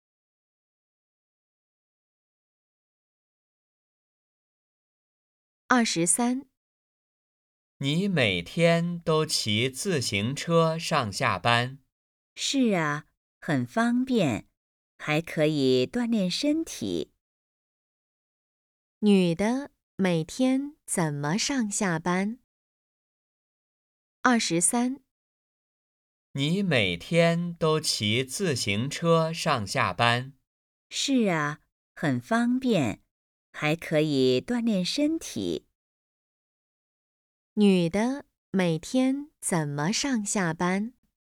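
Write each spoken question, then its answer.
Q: 女的每天怎么上下班?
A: 骑自行车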